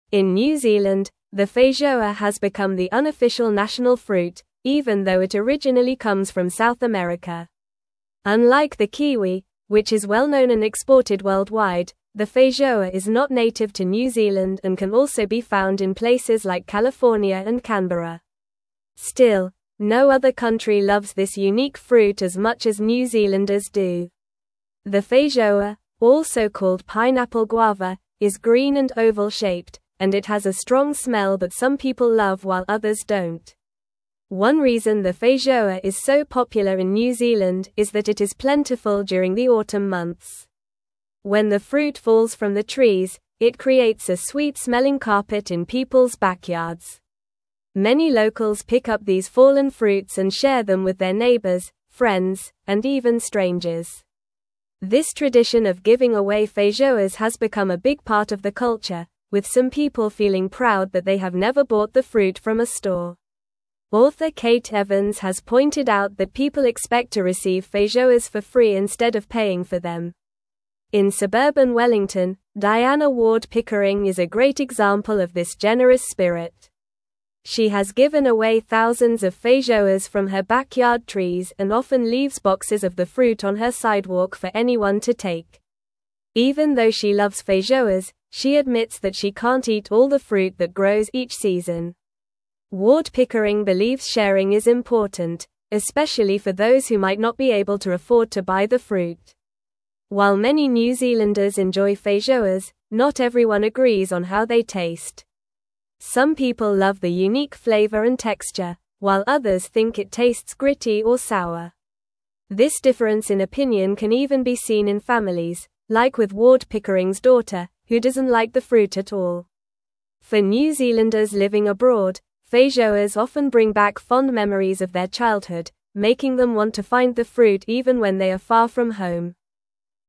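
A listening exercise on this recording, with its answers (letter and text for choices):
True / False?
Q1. Feijoas are scarce in New Zealand during the autumn months.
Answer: False

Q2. Diana Ward-Pickering is not known for sharing thousands of feijoas from her backyard.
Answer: False

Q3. Opinions on the taste of feijoas are unanimously loved by New Zealanders, with none disliking it.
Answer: False

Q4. The feijoa originally comes from South America.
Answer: True

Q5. For New Zealanders living abroad, feijoas often remind them of their adulthood.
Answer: False

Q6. Unlike the kiwi, the feijoa is not exported worldwide.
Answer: True

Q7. The feijoa is considered New Zealand's unofficial national fruit.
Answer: True

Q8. Many New Zealanders have a tradition of giving away feijoas to friends and neighbors.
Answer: True

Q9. What is the unofficial national fruit of New Zealand?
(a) Feijoa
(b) Kiwi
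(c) Apple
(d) Mango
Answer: (a) Feijoa

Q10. Where does the feijoa originally come from?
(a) Australia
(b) Africa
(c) Europe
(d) South America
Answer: (d) South America

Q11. What is another name for the feijoa?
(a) Dragon fruit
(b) Passion fruit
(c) Star fruit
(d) Pineapple guava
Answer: (d) Pineapple guava

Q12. During which season is the feijoa plentiful in New Zealand?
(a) Winter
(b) Autumn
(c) Spring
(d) Summer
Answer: (b) Autumn

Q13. Who is mentioned as a generous person sharing feijoas in suburban Wellington?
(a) Kate Evans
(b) Diana Ward-Pickering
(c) A local farmer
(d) A store owner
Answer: (b) Diana Ward-Pickering

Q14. What do many New Zealanders expect regarding feijoas?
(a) To receive them for free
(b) To buy them at the store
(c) To grow them themselves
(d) To import them from abroad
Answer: (a) To receive them for free

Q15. How do some people in New Zealand feel about the taste of feijoas?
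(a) Everyone loves it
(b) It is universally disliked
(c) They have mixed opinions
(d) It is only popular with tourists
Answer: (c) They have mixed opinions

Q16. What do feijoas remind New Zealanders living abroad of?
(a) Their favorite vacation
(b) Popular tourist spots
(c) Fond memories of childhood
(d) Traditional holidays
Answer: (c) Fond memories of childhood

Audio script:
In New Zealand, the feijoa has become the unofficial national fruit, even though it originally comes from South America. Unlike the kiwi, which is well-known and exported worldwide, the feijoa is not native to New Zealand and can also be found in places like California and Canberra. Still, no other country loves this unique fruit as much as New Zealanders do. The feijoa, also called pineapple guava, is green and oval-shaped, and it has a strong smell that some people love while others don't.
One reason the feijoa is so popular in New Zealand is that it is plentiful during the autumn months. 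When the fruit falls from the trees, it creates a sweet-smelling carpet in people's backyards. Many locals pick up these fallen fruits and share them with their neighbors, friends, and even strangers. This tradition of giving away feijoas has become a big part of the culture, with some people feeling proud that they have never bought the fruit from a store. Author Kate Evans has pointed out that people expect to receive feijoas for free instead of paying for them.
In suburban Wellington, Diana Ward-Pickering is a great example of this generous spirit. She has given away thousands of feijoas from her backyard trees and often leaves boxes of the fruit on her sidewalk for anyone to take. Even though she loves feijoas, she admits that she can't eat all the fruit that grows each season. Ward-Pickering believes sharing is important, especially for those who might not be able to afford to buy the fruit.
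While many New Zealanders enjoy feijoas, not everyone agrees on how they taste. Some people love the unique flavor and texture, while others think it tastes gritty or sour. This difference in opinion can even be seen in families, like with Ward-Pickering's daughter, who doesn't like the fruit at all. For New Zealanders living abroad, feijoas often bring back fond memories of their childhood, making them want to find the fruit even when they are far from home.

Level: Level 3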